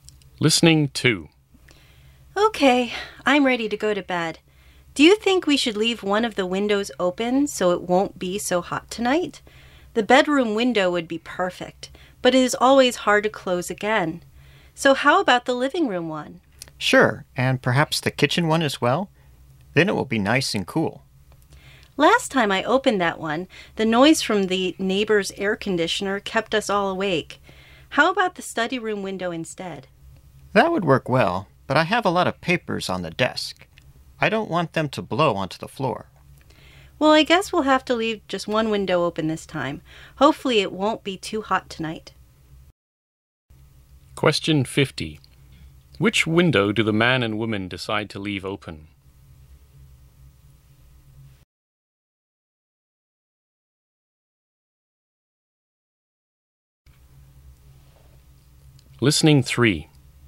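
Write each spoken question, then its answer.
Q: Which window do the man and woman decide to leave open?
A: The living room window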